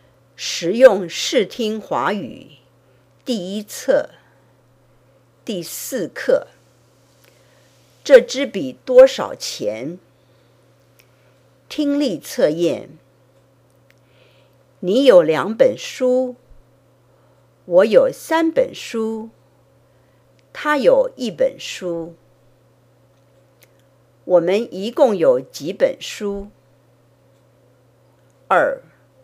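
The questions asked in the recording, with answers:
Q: 我们一共有几本书?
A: 六本书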